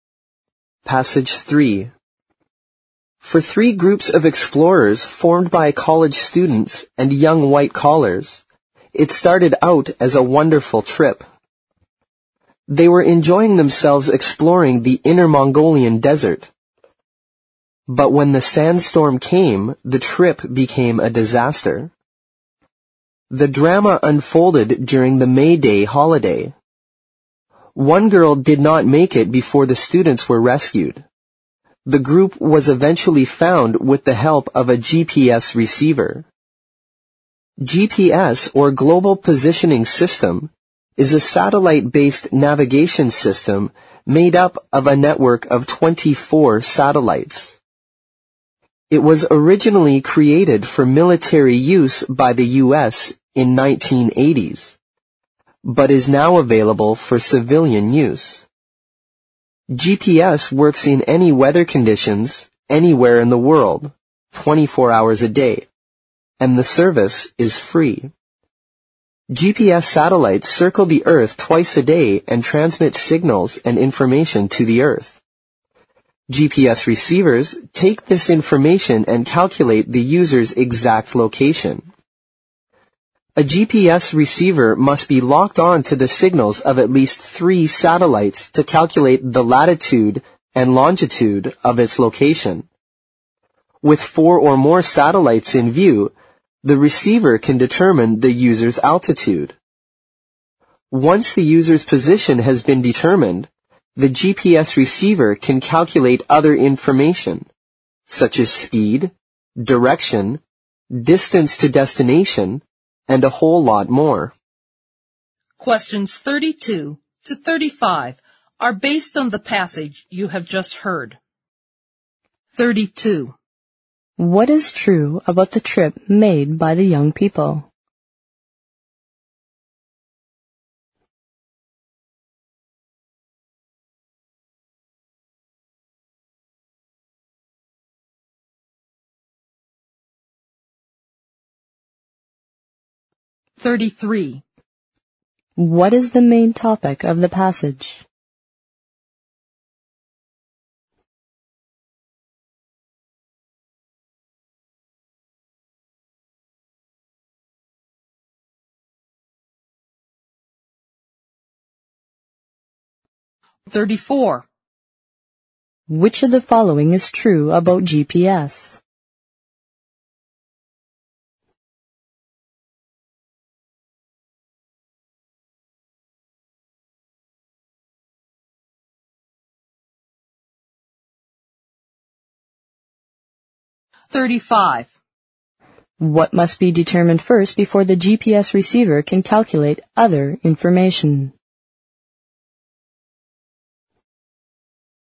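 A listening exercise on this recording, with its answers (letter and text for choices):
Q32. 32.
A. It was doomed for the start.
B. It turned out to be a disaster.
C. It was spolied by one girl.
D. All the students enjoyed it.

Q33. 33.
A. A thrilling exploration in the desert.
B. How GPS saved the survivors.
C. What is GPS and how it works.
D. The danger of space exploration.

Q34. 34.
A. It was created mainly for scientific research.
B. It works better in fine weather conditions.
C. It must be located on at least three satellites.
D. Its service is free of charge.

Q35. 35.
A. The user's position.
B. The speed of the satellites.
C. The distance to destination.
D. The information to the earth.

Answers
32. B. It turned out to be a disaster.
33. C. What is GPS and how it works.
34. D. Its service is free of charge.
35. A. The user's position.

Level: 四级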